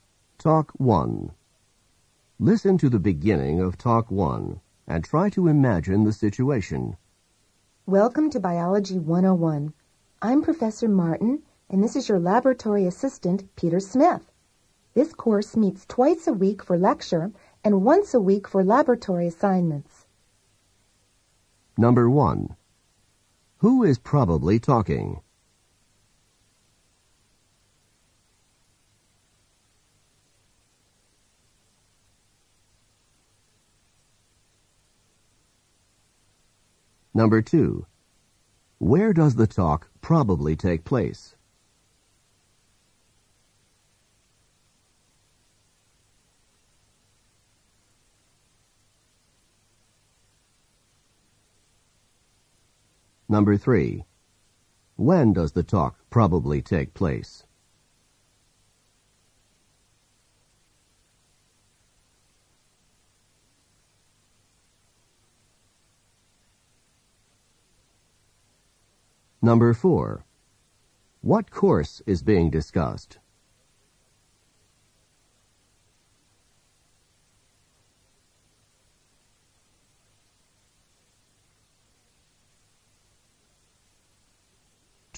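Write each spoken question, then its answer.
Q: Who is probably talking?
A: A biology professor

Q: When does the talk probably take place?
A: On the first day of the course

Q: What course is being discussed?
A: Biology 101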